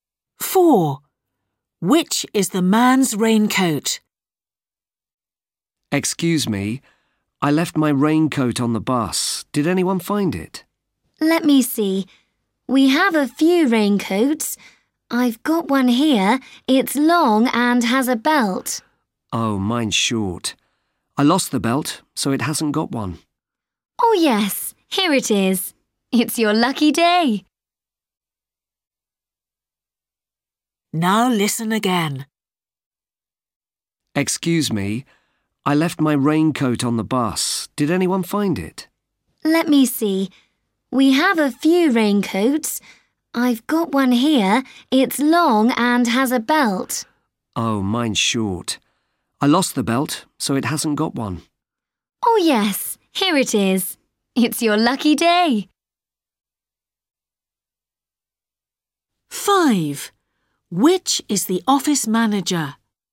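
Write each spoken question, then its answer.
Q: Which is the man's raincoat?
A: A short raincoat without a belt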